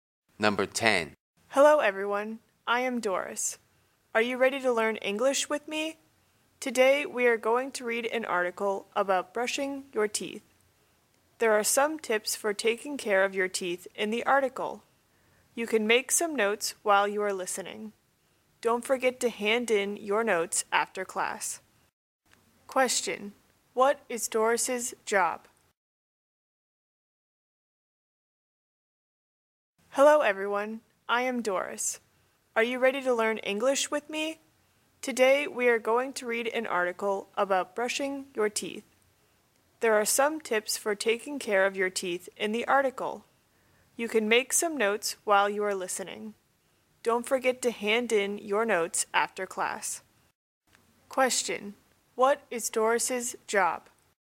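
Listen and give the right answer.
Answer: An English teacher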